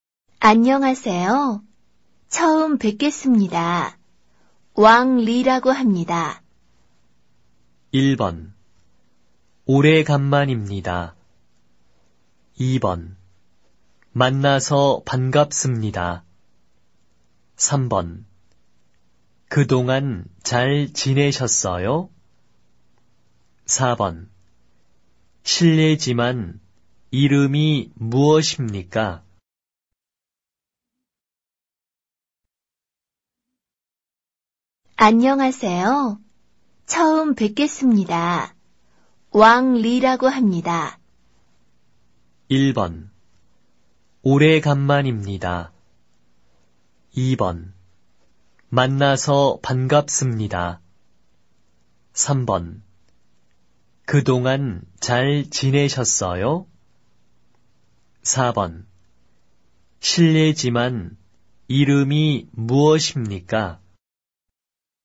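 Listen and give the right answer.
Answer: 2: 만나서 반갑습니다.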